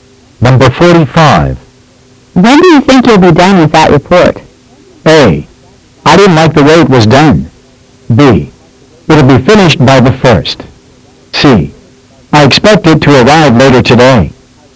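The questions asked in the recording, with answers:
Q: When do you think you'll be done with that report?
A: B: It'll be finished by the 1st.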